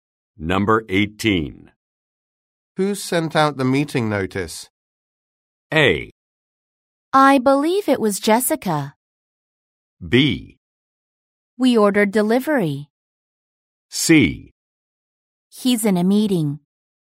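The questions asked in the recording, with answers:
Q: Who sent out the meeting notice?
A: A: I believe it was Jessica.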